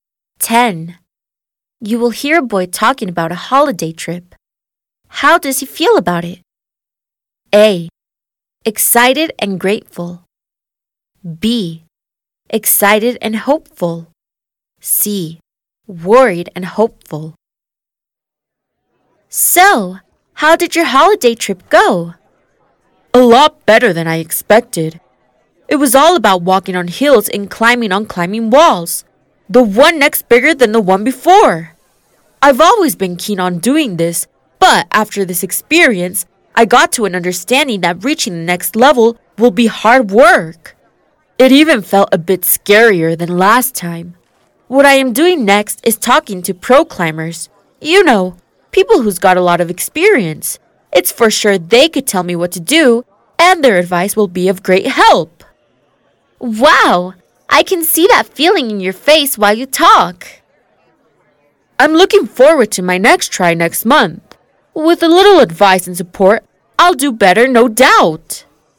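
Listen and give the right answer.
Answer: B: Excited and hopeful.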